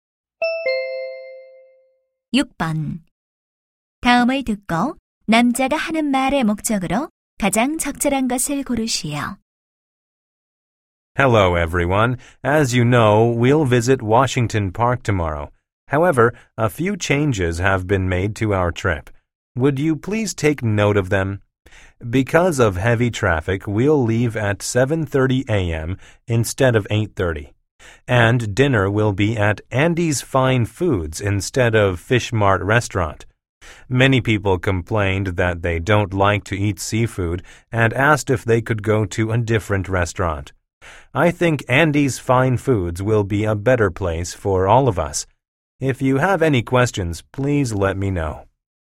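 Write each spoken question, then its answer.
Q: 다음을 듣고 남자가 하는 말의 목적으로 가장 적절한 것을 고르시오.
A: 여행 일정 변경을 알리려고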